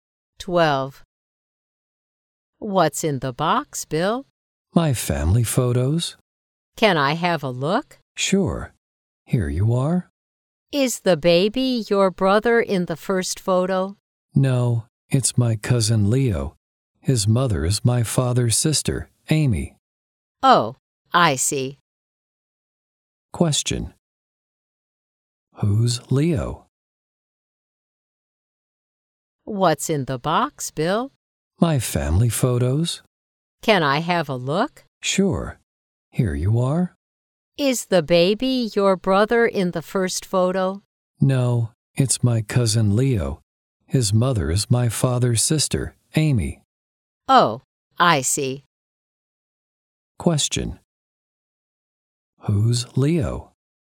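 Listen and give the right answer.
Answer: Bill's cousin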